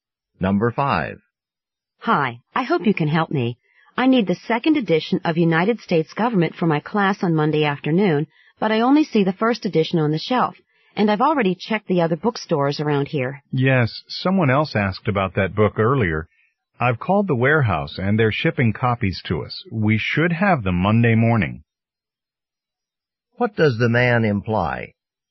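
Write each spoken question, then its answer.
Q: What does the man imply?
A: The woman can get the second edition on Monday morning.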